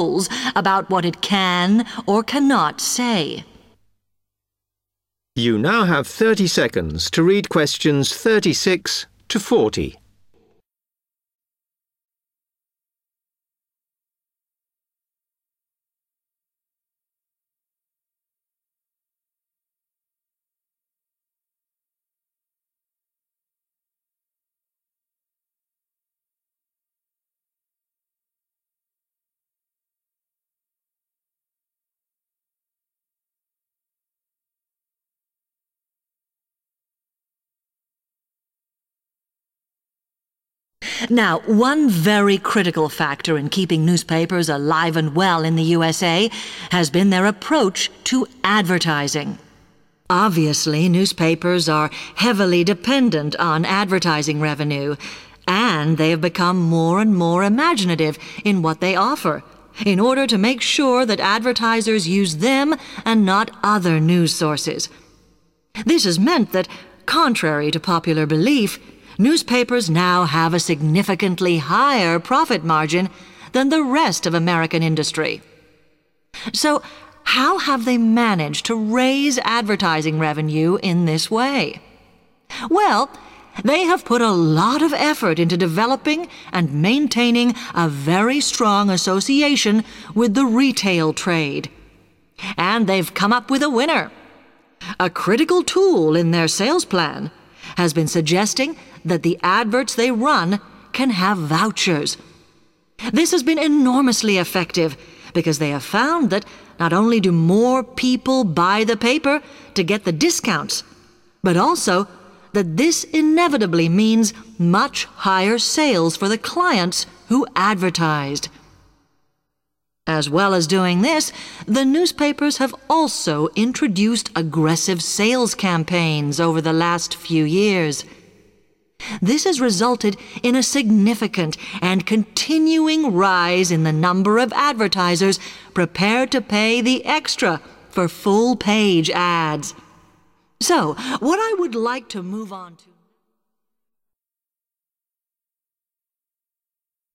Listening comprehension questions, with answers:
Complete the summary below. Write NO MORE THAN TWO WORDS for each answer.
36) In the USA, newspapers are being increasingly inventive about the way they attract advertisers and their 36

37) Advertising has increased because of a good relationship with the 37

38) In addition, newspapers now run more adverts which include 38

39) These have been found to raise readership of the papers and create more sales for the 39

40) There are also an increasing number of more expensive 40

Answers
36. profit margin
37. retail trade / retail
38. vouchers
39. clients
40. full-page / full page

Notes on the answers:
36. The correct answer is "profit margin" because the speaker explains that newspapers make money through creative advertising methods. As a result, their "profit margin" is much higher than that of other US businesses, which matches the sentence stating that their profit margin "now exceeds that of other industries."
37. The correct answer is confirmed by the speaker's explanation of how newspapers increased their advertising income. The lecturer mentions that newspapers worked hard to develop and maintain a "very strong association with the retail trade." In the summary, "a good relationship with" matches "a very strong association with," and "trade" corresponds to "sector," making "retail" the missing word.
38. The correct answer is "vouchers" because the speaker discusses how newspapers improved their advertising sales. The speaker notes that an important method in their sales plan was recommending that "the adverts they run can have vouchers". In the summary, the phrase "run more adverts which include" corresponds directly to "the adverts they run can have vouchers".
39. The correct answer is "clients" because the summary asks who benefits from increased sales due to discount adverts. The speaker states that putting discount vouchers in advertisements "inevitably means much higher sales for the clients who advertised." Therefore, "clients" correctly completes the phrase "create more sales for the clients."
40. The correct answer is "full-page" (or "full page") because the speaker explains that more advertisers are now willing to pay extra money for these larger advertisements. In the summary, "an increasing number of" matches "a significant and continuing rise in the number of", and "more expensive" matches "pay the extra for". Therefore, the missing word describing the adverts is "full-page".

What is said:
Television, however, is seen as critical to political power and has become subject to harsh controls about what it can or cannot say.
Now one very critical factor in keeping newspapers alive and well in the USA has been their approach to advertising. Obviously newspapers are heavily dependent on advertising revenue and they have become more and more imaginative in what they offer, in order to make sure that advertisers use them, and not other news sources. This has meant that, contrary to popular belief, newspapers now have a significantly higher profit margin than the rest of American industry. So how have they managed to raise advertising revenue in this way? Well, they have put a lot of effort into developing and maintaining a very strong association with the retail trade. And they've come up with a winner. A critical tool in their sales plan has been suggesting that the adverts they run can have vouchers. This has been enormously effective because they have found that, not only do more people buy the paper to get the discounts but also that this inevitably means much higher sales for the clients who advertised. As well as doing this, the newspapers have also introduced aggressive sales campaigns over the last few years. This has resulted in a significant and continuing rise in the number of advertisers prepared to pay the extra for full-page ads. So, what I would like ...